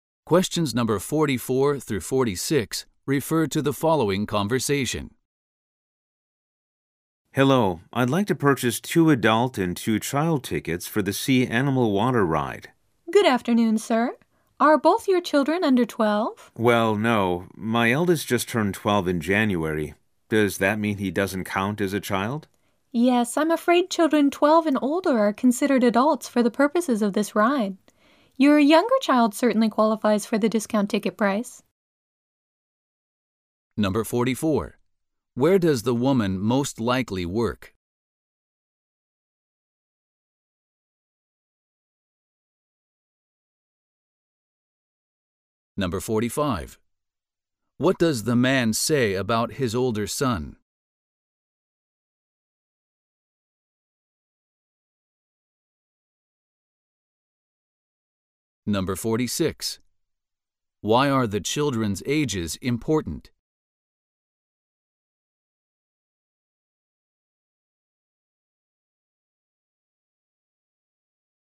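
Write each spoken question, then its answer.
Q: What does the man say about his older son?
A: He just turned 12 in January

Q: Why are the children's ages important?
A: Only children under 12 get the discounted child ticket price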